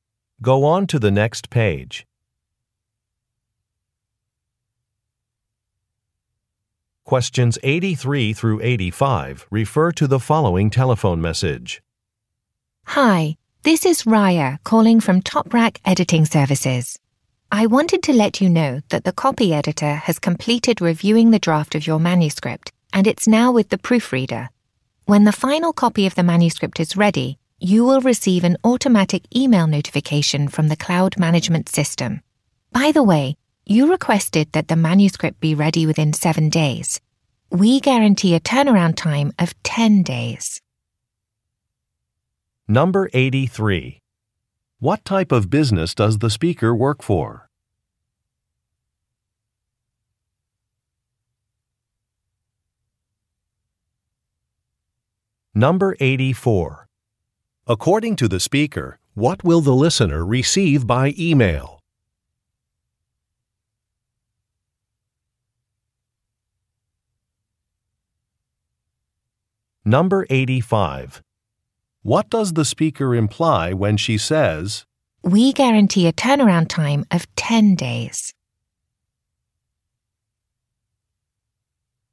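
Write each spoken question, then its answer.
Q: What type of business does the speaker work for?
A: An editing service

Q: According to the speaker, what will the listener receive by email?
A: A notification that the final copy is ready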